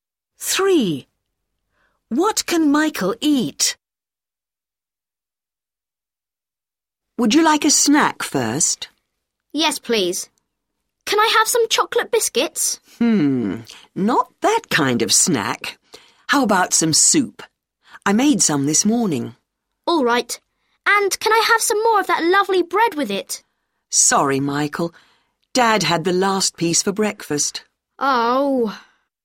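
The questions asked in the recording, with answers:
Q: What can Michael eat?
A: soup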